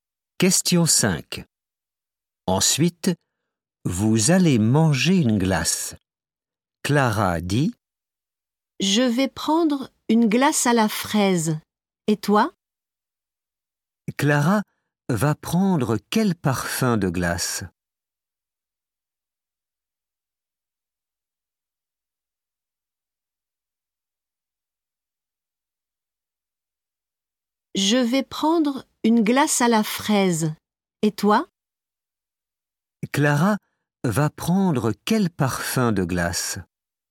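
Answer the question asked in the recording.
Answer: Fraise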